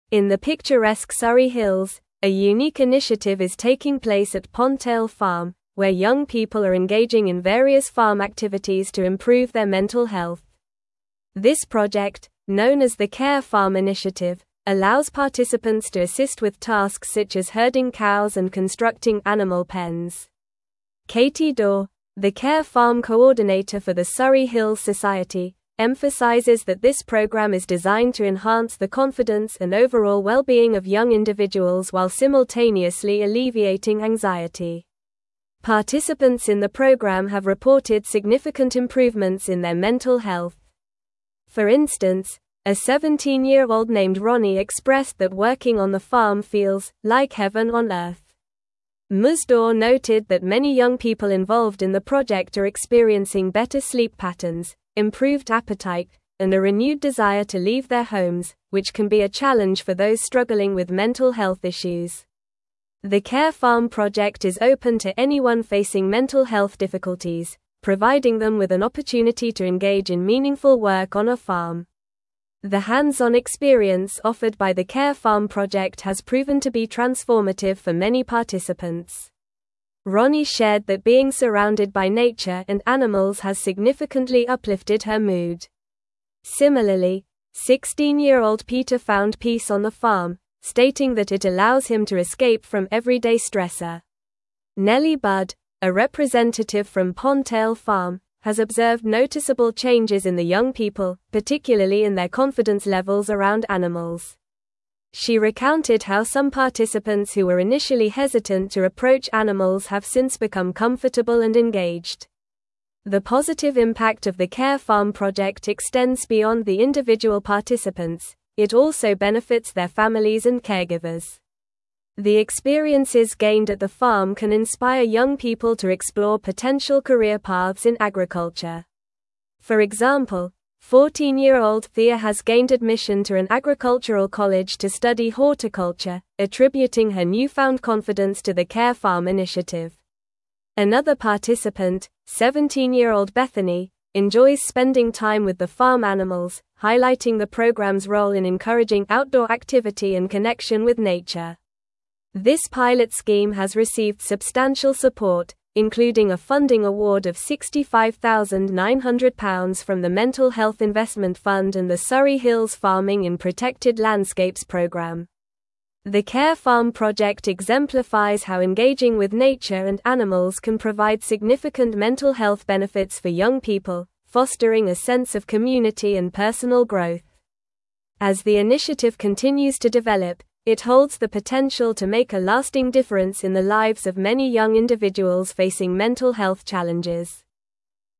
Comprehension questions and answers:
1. What activities do participants engage in at Pondtail Farm as part of the Care Farm initiative?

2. How does Katie Daw describe the goals of the Care Farm program for young individuals?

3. What specific improvements in mental health have participants reported since joining the program?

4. In what ways has being on the farm positively affected Ronnie's mood and mental health?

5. How has the Care Farm project influenced the confidence levels of participants around animals, according to Nellie Budd?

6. What potential career opportunities have emerged for participants as a result of their experiences at the farm?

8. How does the Care Farm project contribute to fostering a sense of community among young people facing mental health challenges?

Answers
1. Participants engage in various farm activities such as herding cows and constructing animal pens.
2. Katie Daw describes the goals of the Care Farm program as enhancing the confidence and overall well-being of young individuals while alleviating anxiety.
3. Participants have reported improvements in sleep patterns, appetite, and a renewed desire to leave their homes.
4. Ronnie shared that being surrounded by nature and animals has significantly uplifted her mood, making her feel "like heaven on earth."
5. Nellie Budd observed that participants who were initially hesitant to approach animals have since become comfortable and engaged, showing noticeable changes in their confidence levels.
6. Participants have been inspired to explore potential career paths in agriculture, with one participant, Thea, gaining admission to an agricultural college to study horticulture.
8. The Care Farm project fosters a sense of community by providing young people with opportunities to engage in meaningful work on the farm, encouraging connection with nature and each other, which can lead to personal growth and support.

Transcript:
In the picturesque Surrey Hills, a unique initiative is taking place at Pondtail Farm, where young people are engaging in various farm activities to improve their mental health. This project, known as the Care Farm initiative, allows participants to assist with tasks such as herding cows and constructing animal pens. Katie Daw, the Care Farm coordinator for the Surrey Hills Society, emphasizes that this program is designed to enhance the confidence and overall well-being of young individuals while simultaneously alleviating anxiety.
Participants in the program have reported significant improvements in their mental health. For instance, a 17-year-old named Ronnie expressed that working on the farm feels "like heaven on earth." Ms. Daw noted that many young people involved in the project are experiencing better sleep patterns, improved appetite, and a renewed desire to leave their homes, which can be a challenge for those struggling with mental health issues. The Care Farm project is open to anyone facing mental health difficulties, providing them with an opportunity to engage in meaningful work on a farm.
The hands-on experience offered by the Care Farm project has proven to be transformative for many participants. Ronnie shared that being surrounded by nature and animals has significantly uplifted her mood. Similarly, 16-year-old Peter found peace on the farm, stating that it allows him to escape from everyday stressors. Nellie Budd, a representative from Pondtail Farm, has observed noticeable changes in the young people, particularly in their confidence levels around animals. She recounted how some participants who were initially hesitant to approach animals have since become comfortable and engaged.
The positive impact of the Care Farm project extends beyond the individual participants; it also benefits their families and caregivers. The experiences gained at the farm can inspire young people to explore potential career paths in agriculture. For example, 14-year-old Thea has gained admission to an agricultural college to study horticulture, attributing her newfound confidence to the Care Farm initiative. Another participant, 17-year-old Bethany, enjoys spending time with the farm animals, highlighting the program's role in encouraging outdoor activity and connection with nature.
This pilot scheme has received substantial support, including a funding award of £65,900 from the Mental Health Investment Fund and the Surrey Hills Farming in Protected Landscapes program.
Show model answerThe Care Farm initiative has received a funding award of £65,900 from the Mental Health Investment Fund and the Surrey Hills Farming in Protected Landscapes program.
Show model answerThe Care Farm project fosters a sense of community by providing young people with opportunities to engage in meaningful work on the farm, encouraging connection with nature and each other, which can lead to personal growth and support.
Fund and the Surrey Hills Farming in Protected Landscapes program. The Care Farm project exemplifies how engaging with nature and animals can provide significant ? health benefits for young people, fostering a sense of community and personal growth. As the ? continues to develop, it holds the potential to make a lasting difference in the lives of many young individuals facing mental health challenges.

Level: Level 4